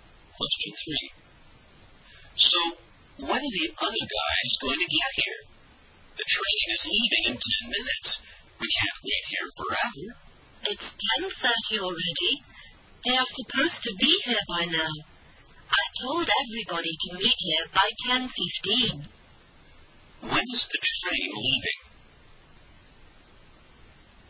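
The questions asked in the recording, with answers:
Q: When is the train leaving?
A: At 10:40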